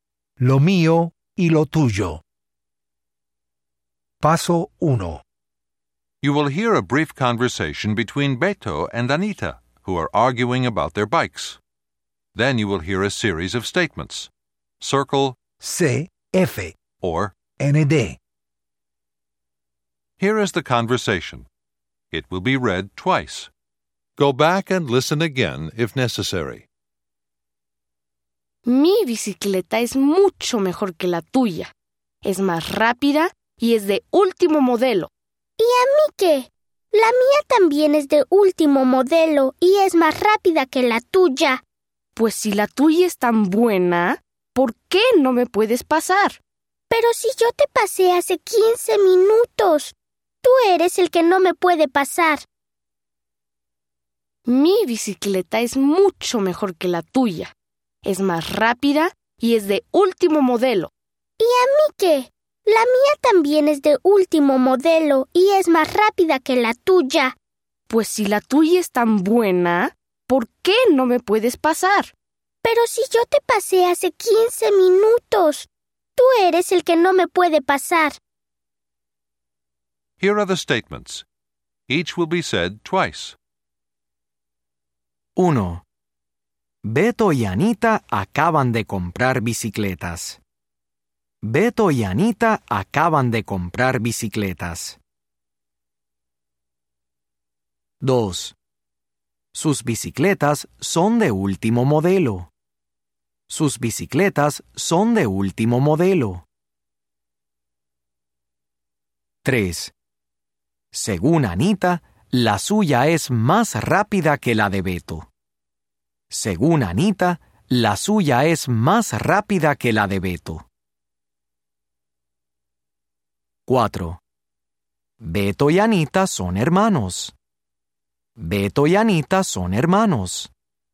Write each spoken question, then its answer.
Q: Beto y Anita acaban de comprar bicicletas.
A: ND

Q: Beto y Anita son hermanos.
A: ND